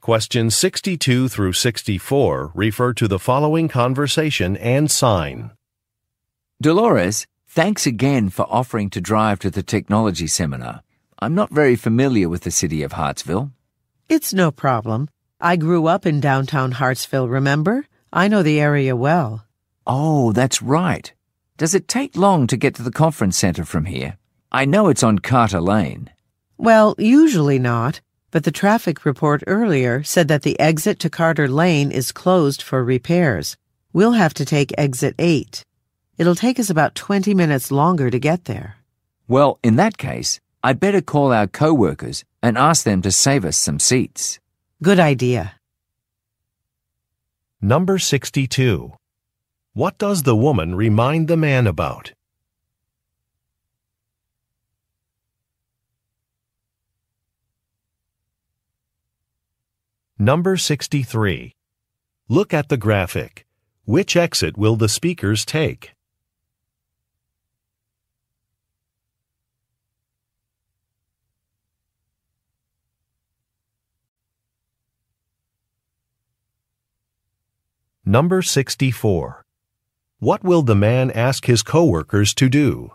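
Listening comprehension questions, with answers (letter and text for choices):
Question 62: What does the woman remind the man about?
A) She used to live in the area.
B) She needs to stop at a store.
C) She attended a seminar last year.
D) She has just bought a new car.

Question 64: What will the man ask his coworkers to do?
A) Cancel a reservation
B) Save some seats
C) Sign in at an event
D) Print some materials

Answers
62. A) She used to live in the area.
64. B) Save some seats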